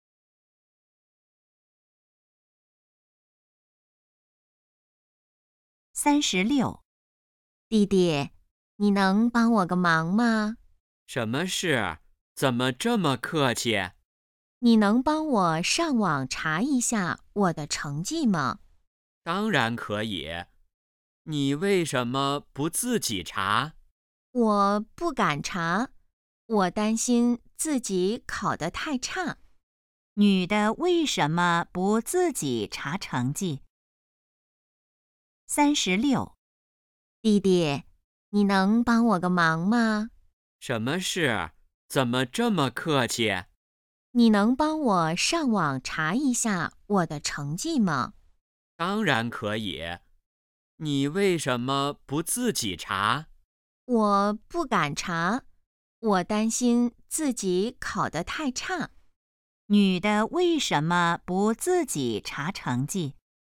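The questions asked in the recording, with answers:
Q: 女的为什么不自己查成绩?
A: 担心自己考得太差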